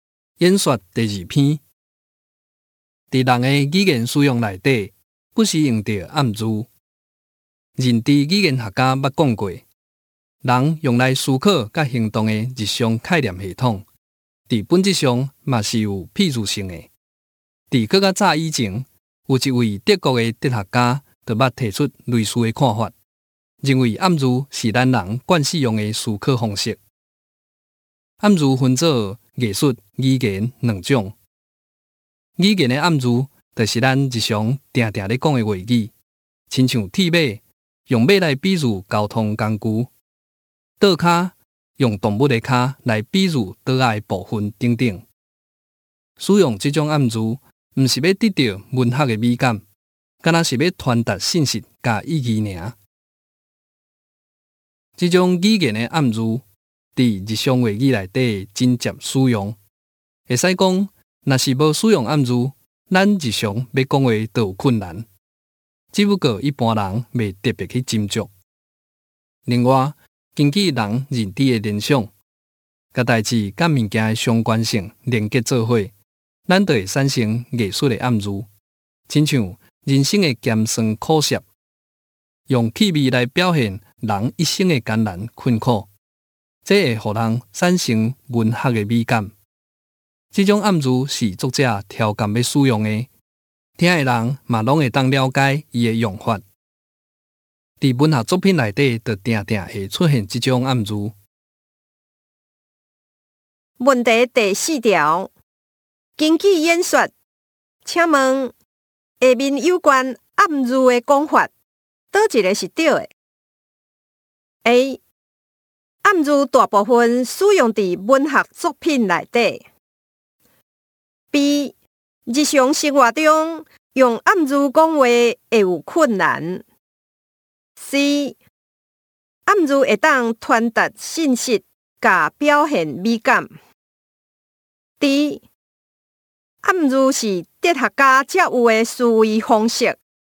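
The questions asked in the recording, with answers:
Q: 根据演说,请问下面有关暗语的讲法,倒一个是对的 ?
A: C: 暗语会当传达信息,甲表现美感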